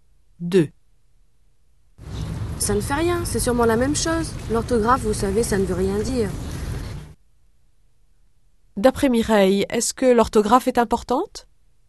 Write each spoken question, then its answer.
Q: D'après Mireille, est-ce que l'orthographe est importante?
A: Non, ça ne veut rien dire.